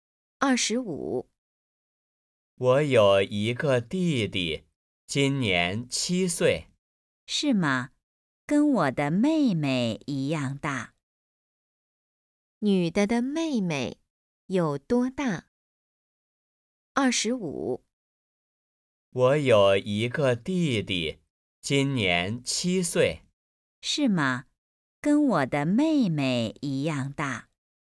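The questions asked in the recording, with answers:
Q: 女的的妹妹有多大?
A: 七岁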